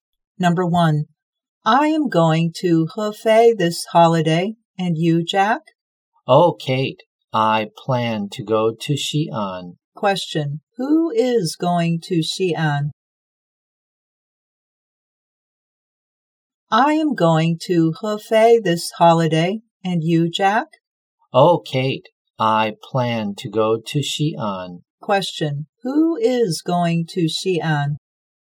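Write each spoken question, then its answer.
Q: Question, who is going to Xi'an?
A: Jack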